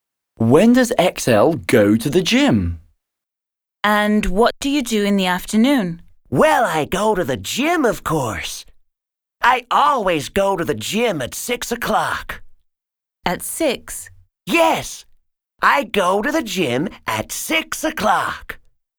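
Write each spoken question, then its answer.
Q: When does XL go to the gym?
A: At 6 o'clock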